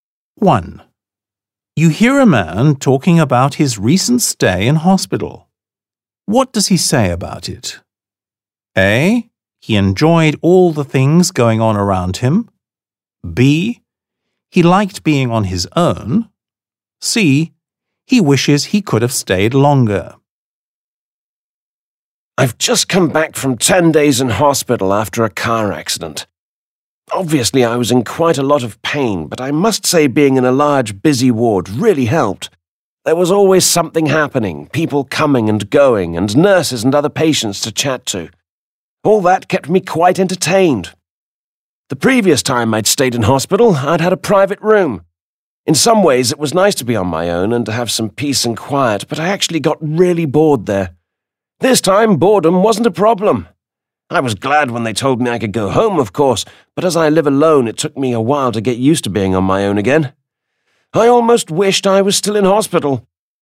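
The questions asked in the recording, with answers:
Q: What does he say about it?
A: A: He enjoyed all the things going on around him.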